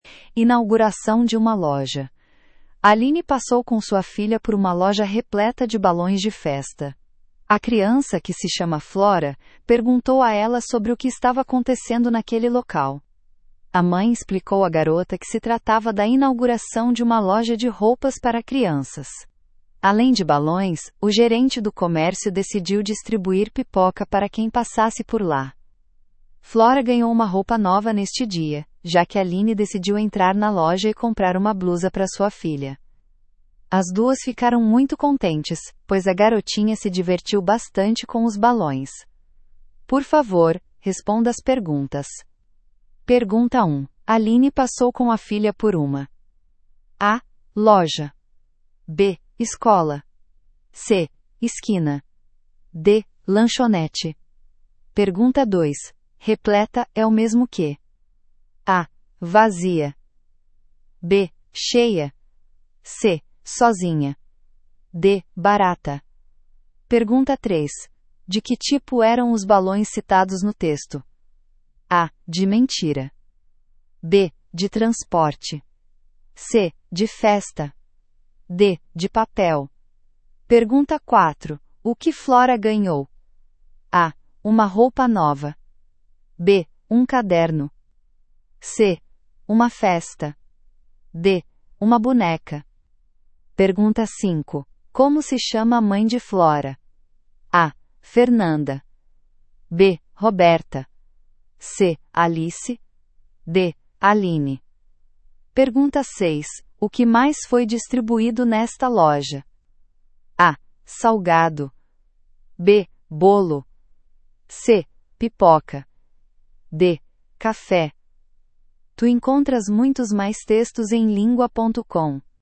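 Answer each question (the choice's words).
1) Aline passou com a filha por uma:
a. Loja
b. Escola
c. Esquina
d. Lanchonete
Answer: Loja

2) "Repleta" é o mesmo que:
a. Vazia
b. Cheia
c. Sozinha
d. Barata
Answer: Cheia

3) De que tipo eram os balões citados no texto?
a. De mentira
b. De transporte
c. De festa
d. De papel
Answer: De festa

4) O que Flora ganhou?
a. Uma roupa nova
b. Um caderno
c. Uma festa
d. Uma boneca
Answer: Uma roupa nova

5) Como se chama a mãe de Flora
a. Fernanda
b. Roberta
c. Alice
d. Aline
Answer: Aline

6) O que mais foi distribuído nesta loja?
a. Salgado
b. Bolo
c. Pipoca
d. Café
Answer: Pipoca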